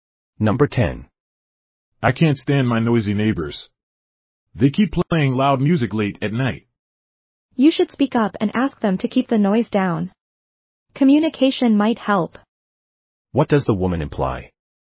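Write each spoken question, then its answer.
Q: What does the woman imply?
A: The man should ask the neighbors to keep the noise down.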